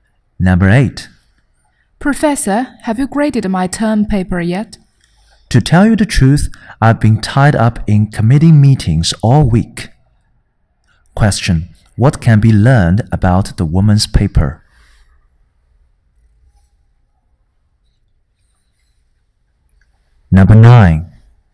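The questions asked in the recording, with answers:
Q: what can be learned about the woman's paper?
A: It hasn't been graded yet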